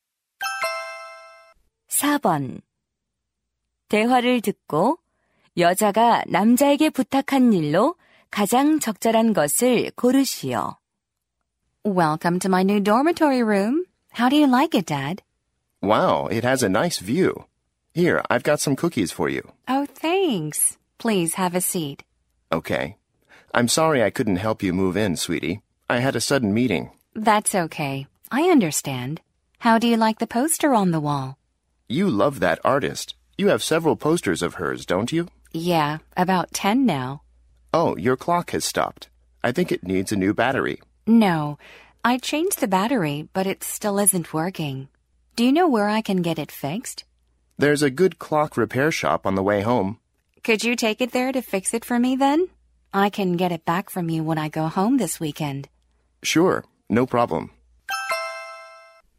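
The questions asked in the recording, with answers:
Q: 대화를 듣고 여자가 남자에게 부탁한 일로 가장 적절한 것을 고르시오.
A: 시계 수리 맡기기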